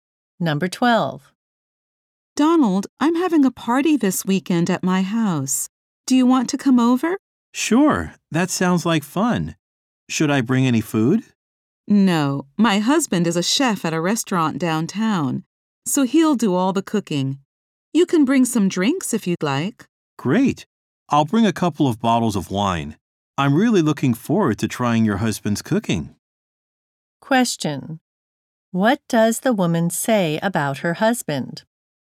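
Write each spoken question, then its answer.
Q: What does the woman say about her husband?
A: He is a chef and will do all the cooking.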